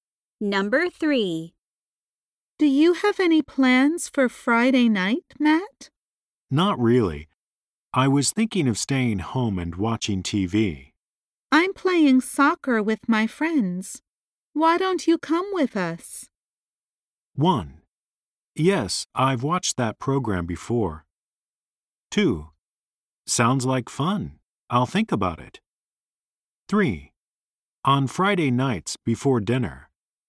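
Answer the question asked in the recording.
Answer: 2: Sounds like fun. I'll think about it.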